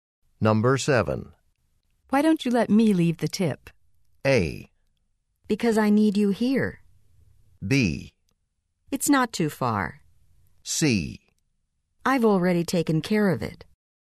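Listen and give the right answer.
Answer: C: I've already taken care of it.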